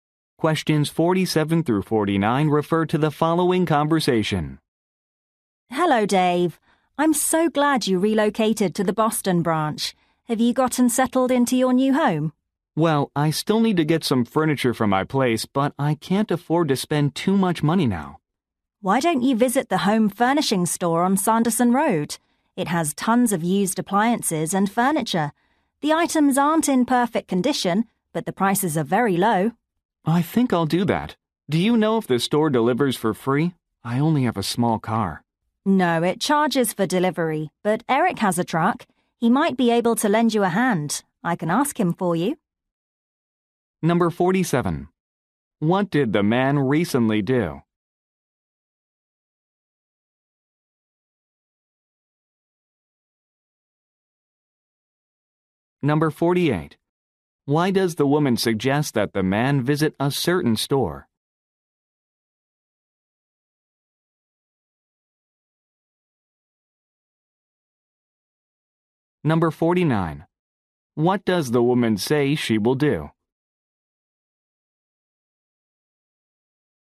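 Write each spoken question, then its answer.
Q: What did the man recently do?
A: Moved to the Boston branch.

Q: Why does the woman suggest that the man visit a certain store?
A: Its prices are very low.

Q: What does the woman say she will do?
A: Ask Eric to help with his truck.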